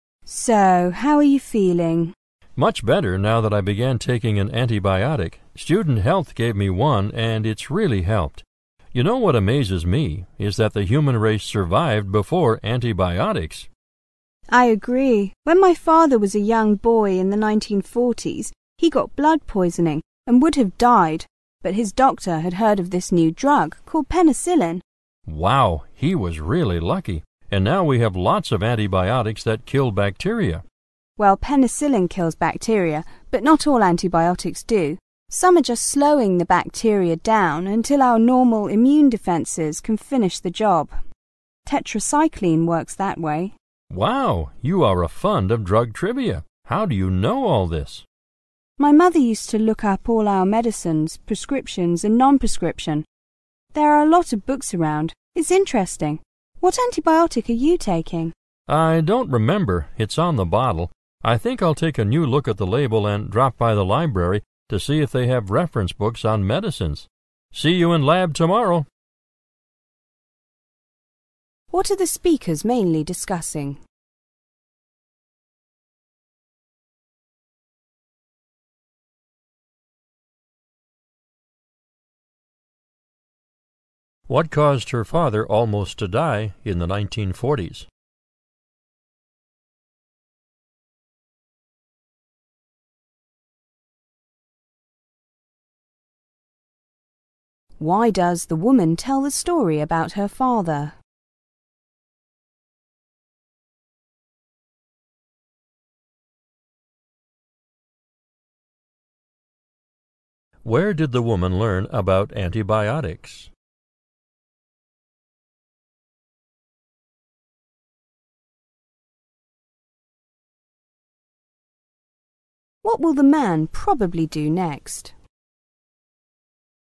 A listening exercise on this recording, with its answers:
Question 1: What caused her father almost to die in the 1940's?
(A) Blood poisoning.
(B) A penicillin.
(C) A heart attack.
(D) An car accident.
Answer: Blood poisoning.

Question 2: Why does the woman tell the story about her father?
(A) To give an example of a bad reaction to penicillin.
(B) To show how penicillin has changed over the years.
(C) To emphasize the importance of antibiotics.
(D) To explain why penicillin requires a prescription.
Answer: To emphasize the importance of antibiotics.

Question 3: Where did the woman learn about antibiotics?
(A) In a pharmacology course.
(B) From her mother.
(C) At the student health center.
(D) From her doctor.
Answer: From her mother.

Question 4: What will the man probably do next?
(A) Look up some information about his medicine.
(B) Take an extra dose of his medicine.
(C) Ask his doctor to change his prescription.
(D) Begin to do research for his lab project.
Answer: Look up some information about his medicine.

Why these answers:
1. blood poisoning意为"败血病"。
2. 女士讲她父亲得败血病的故事是为了说明抗生素的重要性。
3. 从"My mother used to look up all our medicines, prescription and non-prescription. "可知。
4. 男士说要drop by the library to see if they have reference books on medicines,可知他要到图书馆看医学方面的参考书。

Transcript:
[听力原文] W: So how are you feeling? M: Much better now that I began taking an antibiotic. Student health gave me one, and it's really help. You know what amazes me is that the human races survive before antibiotics. W: I agree. When my father was a young boy in the 1940's, he got blood poisoning and would have died. But his doctor had heard of this new drug, called penicillin. M: Wow, he was really lucky. And now we have lots of antibiotics that kill bacteria. W: Well, penicillin kills bacteria, but not all antibiotics do. Some are just slowing the bacteria down until our normal immune defenses can finish the job. Tetracycline works that way. M: Wow, you are a fund of drug trivia. How do you know all these? W: My mother used to look up all our medicines, prescription and non-prescription. There are lots of books around. It's interesting. What antibiotic are you taking? M: I don't remember. It's on the bottle. I think I'll take a new look at the label and drop by the library to see if they have reference books on medicines. See you in lab tomorrow.
What are the speakers mainly discussing?

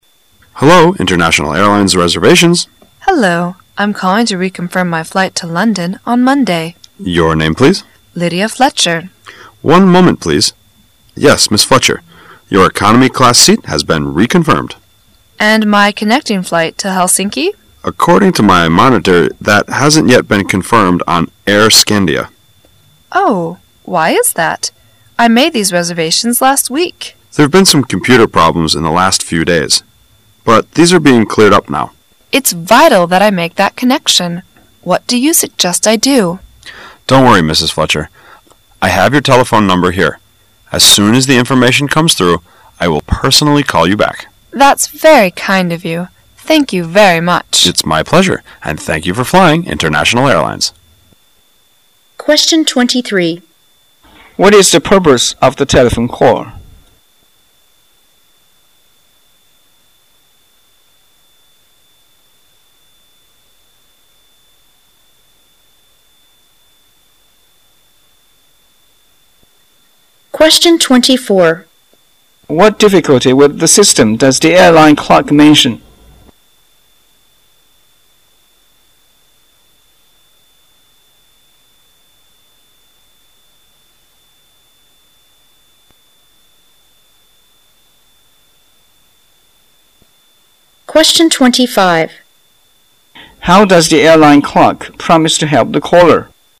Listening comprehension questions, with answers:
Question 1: What difficulty with the system does the airline clerk mention?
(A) Problems with aircraft.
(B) Problems with computers.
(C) Too many passengers.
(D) Too few pilots and passengers.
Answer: Problems with computers.

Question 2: How does the airline clerk promise to help the caller?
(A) By calling her back.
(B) By making her reservation.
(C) By rewriting her ticket.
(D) By meeting her at the airport.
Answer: By calling her back.

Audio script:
[解析] 23-25 M: Hello, International Airlines, reservations. W: Hello. I'm calling to reconfirm my flight to London on Monday. M: Your name, please? W: Lydia Fletcher. M: One moment, please. Yes, Mrs. Fletcher, your economy class seat has been reconfirmed. W: And my connecting flight to Helsinki? M: According to my monitor, that hasn't yet been confirmed on Air Scandia. W: Oh, why is that? I made these reservations last week. M: There have been some computer problems in the last few days, but these are being cleared up now. W: It's vital that I make that connection. What do you suggest I do? M: Don't worry, Mrs. Fletcher. I have your telephone number here. As soon as the information comes through, I will personally call you back. W: That's very kind of you. Thank you very much. M: It's my pleasure. And thank you for flying International Airlines. What is the purpose of the telephone call?

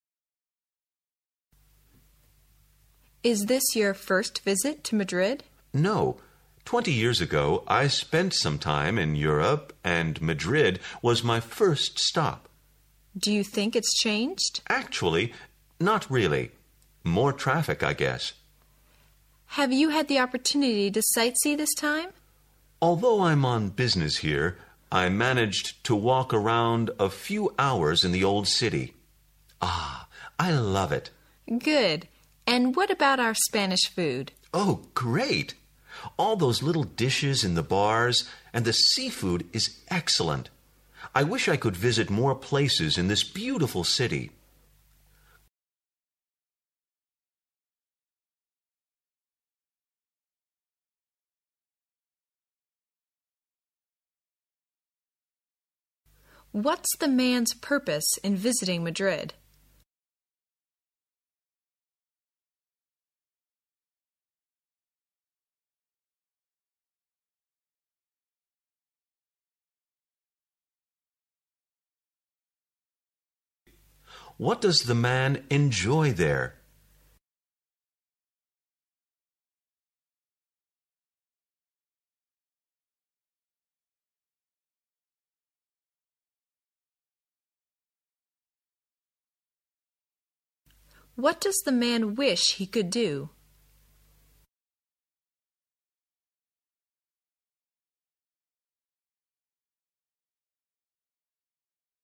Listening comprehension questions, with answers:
Questions 19 to 21 are based on the conversation you have just heard.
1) What does the man enjoy there?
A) The old city.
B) The bars.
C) The traffic.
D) The fresh air.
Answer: The old city.

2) What does the man wish he could do?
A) He could live in Madrid forever.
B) He could visit more parts of Madrid.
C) He could taste more Spanish food.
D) He could have another opportunity to visit Madrid.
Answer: He could visit more parts of Madrid.

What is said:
[解析] 19-21 W: Is this your first visit to Madrid? M: No. Twenty years ago I spent some time in Europe and Madrid was my first stop. W: Do you think it has changed? M: Actually, not really. More traffic I guess. W: Have you had the opportunity to sightsee this time? M: Although I'm on business here, I managed to walk around a few hours in the old city. Ah, I love it. W: Good, and what about our Spanish food? M: Oh, great! All those little dishes in the bars and the seafood is excellent! I wish I could visit more places in this beautiful city. What's the man's purpose in visiting Madrid?

